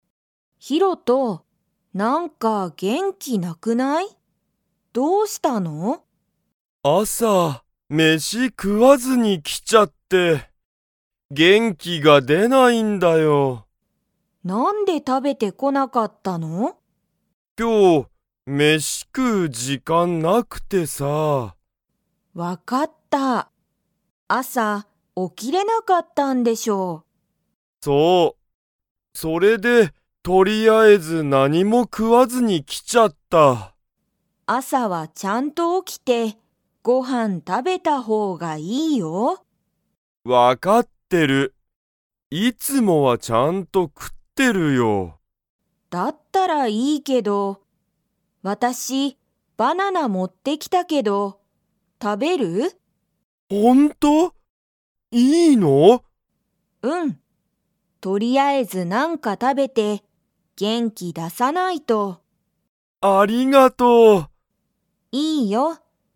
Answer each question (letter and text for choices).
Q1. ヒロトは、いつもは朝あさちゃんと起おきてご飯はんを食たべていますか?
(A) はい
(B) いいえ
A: (A) はい

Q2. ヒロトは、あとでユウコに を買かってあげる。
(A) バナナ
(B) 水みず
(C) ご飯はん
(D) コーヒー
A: (D) コーヒー

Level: Level 3